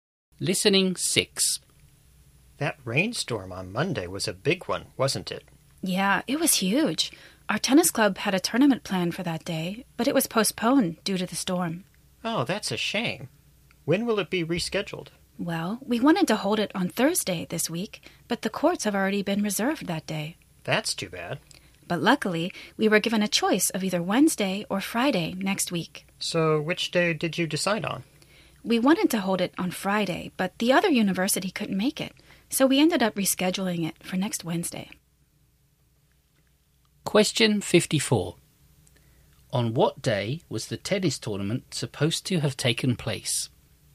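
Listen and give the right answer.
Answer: Monday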